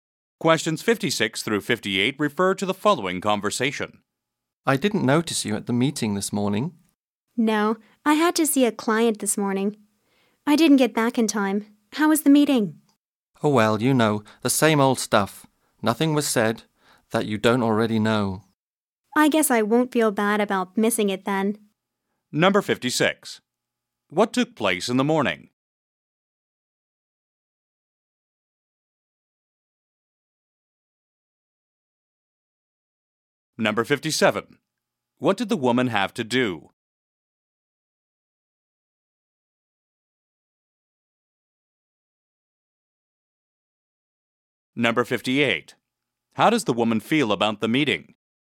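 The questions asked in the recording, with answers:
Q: What took place in the morning?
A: A meeting

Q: What did the woman have to do?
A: See a client

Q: How does the woman feel about the meeting?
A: She doesn't feel bad about missing it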